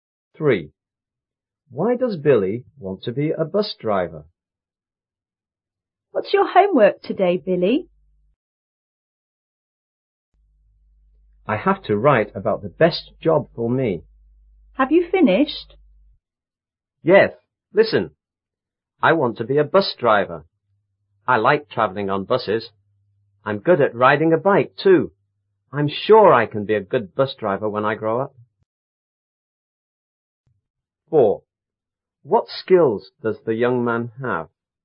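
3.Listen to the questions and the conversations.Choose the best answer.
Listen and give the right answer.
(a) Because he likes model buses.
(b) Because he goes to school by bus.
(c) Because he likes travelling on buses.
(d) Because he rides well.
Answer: (c) Because he likes travelling on buses.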